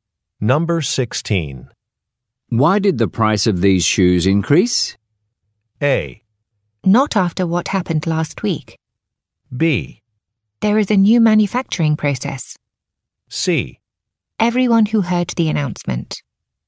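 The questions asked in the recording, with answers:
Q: Why did the price of these shoes increase?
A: B: There is a new manufacturing process.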